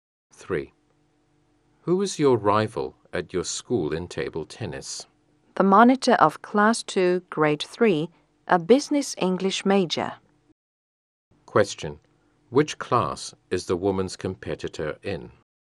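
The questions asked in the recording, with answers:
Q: Which class is the woman's competitor in?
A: Class 2, Grade 3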